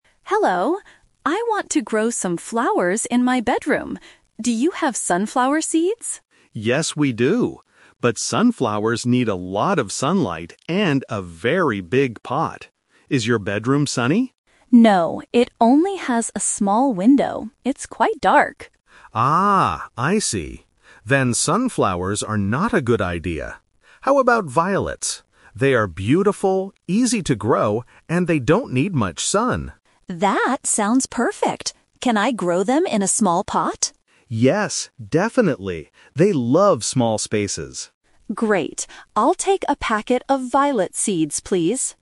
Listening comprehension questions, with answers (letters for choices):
Listen to a conversation between a customer and a shop assistant. Choose the correct answer (A, B, or C).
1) What kind of flower seeds did Mary want to buy at first?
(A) Rose seeds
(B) Violet seeds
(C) Sunflower seeds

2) What is the problem with Mary's bedroom?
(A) It is too cold for flowers.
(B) It does not have much sunlight.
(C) It does not have a window.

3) Why does John suggest growing violets?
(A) Because they are very cheap.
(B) Because they don't need much sun.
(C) Because they need a big pot.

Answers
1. C
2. B
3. B

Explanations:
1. Mary asks at the very beginning: "Do you have sunflower seeds?"
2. Mary says her room "only has a small window" and "It's quite dark." This means it doesn't have much sunlight.
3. John suggests violets because they are "easy to grow, and they don't need much sun."

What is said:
I want to grow some flowers in my bedroom. Do you have sunflower seeds?
John: Yes, we do. But sunflowers need a lot of sunlight and a very big pot. Is your bedroom sunny?
Mary: No, it only has a small window. It's quite dark.
John: Ah, I see. Then sunflowers are not a good idea. How about violets? They are beautiful, easy to grow, and they don't need much sun.
Mary: That sounds perfect! Can I grow them in a small pot?
John: Yes, definitely. They love small spaces.